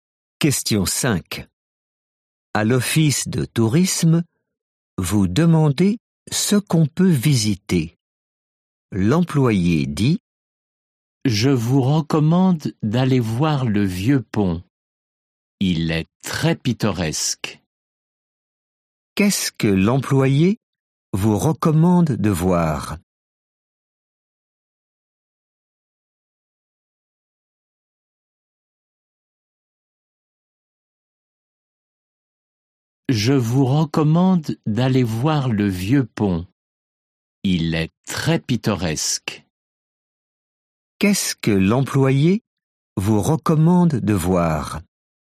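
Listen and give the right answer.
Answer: le vieux pont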